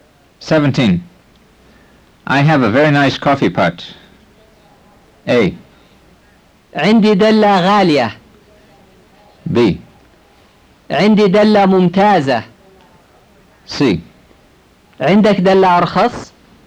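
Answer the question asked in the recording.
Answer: B: عندي دلة ممتازة.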